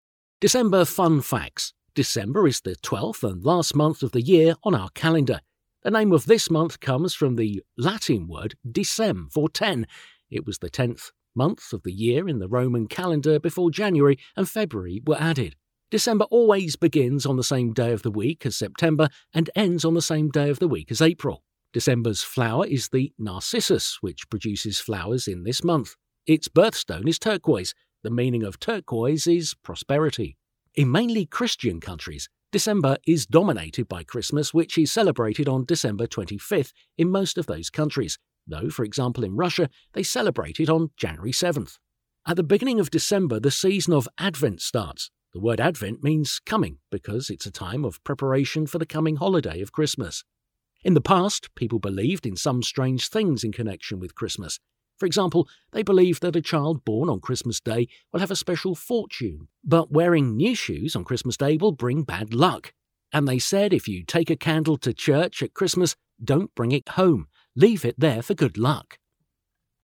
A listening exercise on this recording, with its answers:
Listen to the information about December. Why are the following words mentioned?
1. ten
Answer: The name of the month comes from the Latin word for "ten" and it was the tenth month of the year.

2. September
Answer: It always begins on the same day of the week as September.

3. April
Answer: It always ends on the same day of the week as April.

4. narcissus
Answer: It is December's flower it produces flowers in this month.

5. January 7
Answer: Christmas is celebrated on this day in Russia

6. coming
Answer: The word Advent means coming because of the coming holiday of Christmas.

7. a child born on Christmas Day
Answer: They thought that the child will have a special fortune.

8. new shoes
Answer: They thought that wearing new shoes on Christmas Day will bring bad luck.

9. candle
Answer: They said if you take a candle to church at Christmas don't bring it home, but leave it there.

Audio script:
December fun facts
December is the twelfth and last month of the year on our calendar. The name of this month comes from the Latin word decem for "ten", it was the tenth month of the year in the Roman calendar before January and February were added. December always begins on the same day of the week as September and ends on the same day of the week as April. December's flower is the narcissus, which produces flowers in this month. Its birthstone is turquoise. The meaning of turquoise is prosperity.
In mainly Christian countries, December is dominated by Christmas, which is celebrated on December 25 in most of those countries, though for example in Russia they celebrate it on January 7.
At the beginning of December, the season of Advent starts. The word Advent means 'coming' because it's a time of preparation for the coming holiday of Christmas.
In the past, people believed in some strange things in connection with Christmas. For example, they believed that a child born on Christmas Day will have a special fortune but wearing new shoes on Christmas Day will bring bad luck.
8. They thought that wearing new shoes on Christmas Day will bring bad luck.
They said if you take a candle to church at Christmas don't bring it home, but leave it there.

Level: Alapfok (B1)